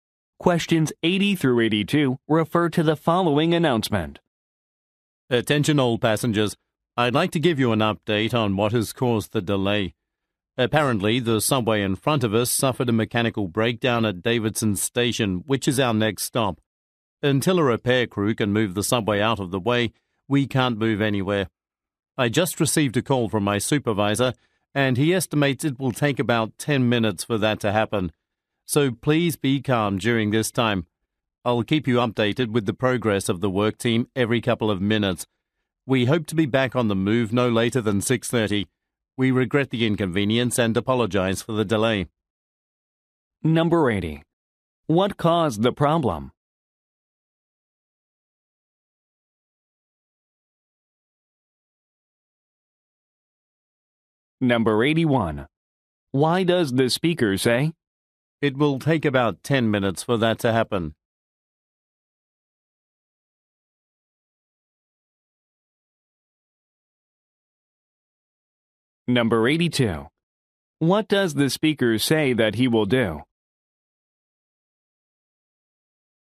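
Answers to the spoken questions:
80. A subway ahead broke down
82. Give updates on the repair progress every couple of minutes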